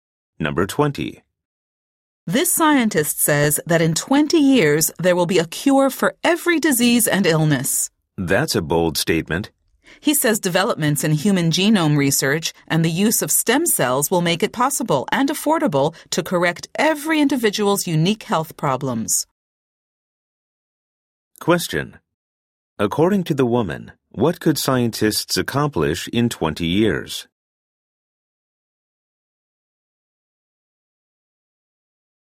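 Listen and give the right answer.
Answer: Find a cure for every disease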